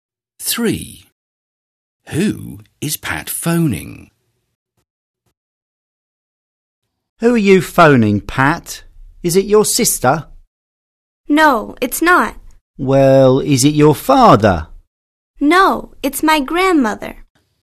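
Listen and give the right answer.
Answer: her grandmother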